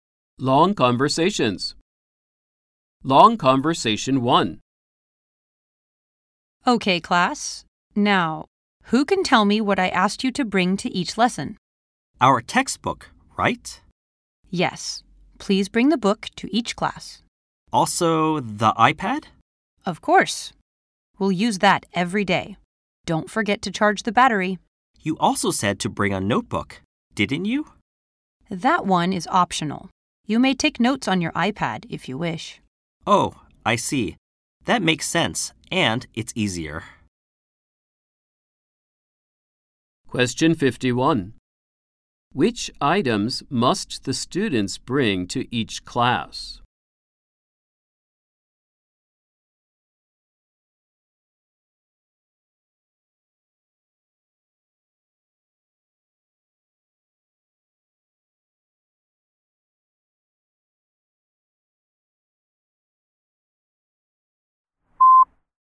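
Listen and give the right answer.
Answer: The textbook and the iPad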